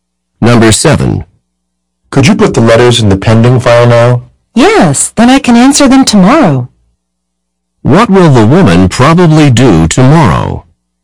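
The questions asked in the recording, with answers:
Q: What will the woman probably do tomorrow?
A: Answer the letters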